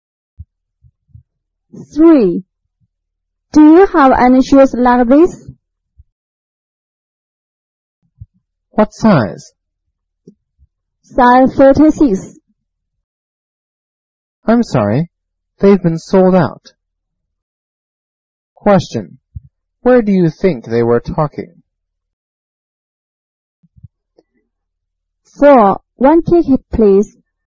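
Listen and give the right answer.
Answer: In a shoe shop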